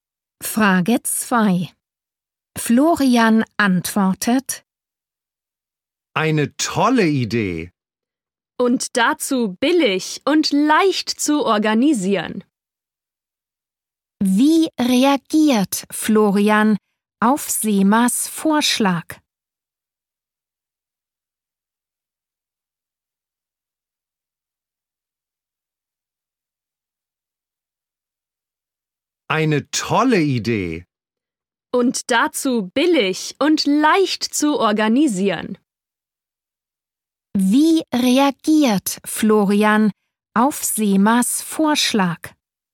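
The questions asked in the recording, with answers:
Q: Wie reagiert Florian auf Semas Vorschlag?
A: Er findet die Idee toll, billig und leicht zu organisieren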